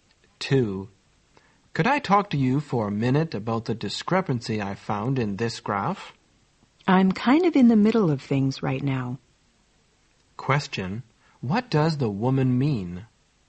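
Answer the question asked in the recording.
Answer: She is busy now and can't talk at the moment.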